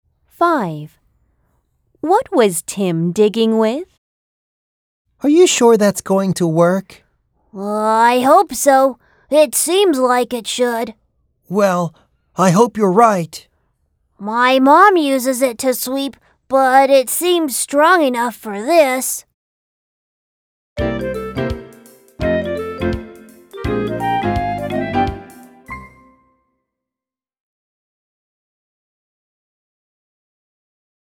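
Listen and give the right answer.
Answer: A broom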